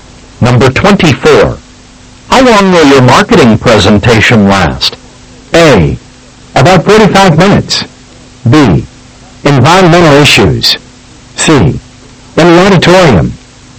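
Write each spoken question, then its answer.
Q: How long will your marketing presentation last?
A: A: About 45 minutes.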